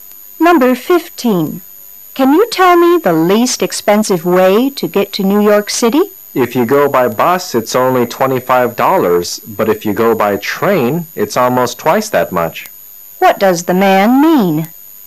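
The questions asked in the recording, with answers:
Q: What does the man mean?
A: Going by bus is the cheapest way.

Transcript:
[解析] W: Can you tell me the least expensive way to get to New York City? M: If you go by bus it's only $ 25. But if you go by train, it's almost twice that much. Q: What does the man mean?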